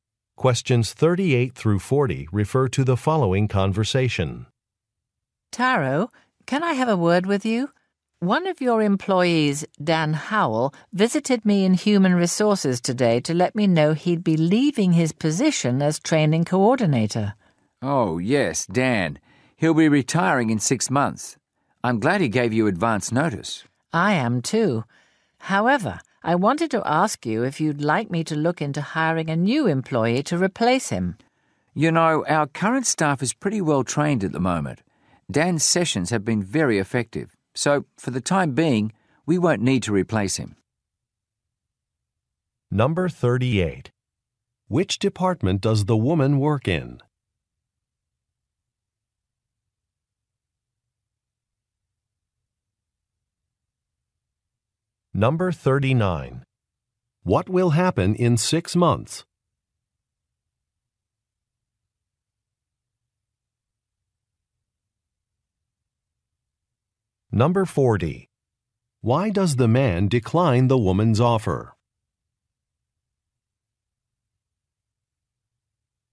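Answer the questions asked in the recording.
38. Human Resources
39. Dan Howell will retire
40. Current staff are already well trained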